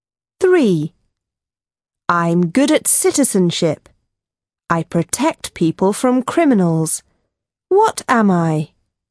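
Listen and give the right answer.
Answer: police officer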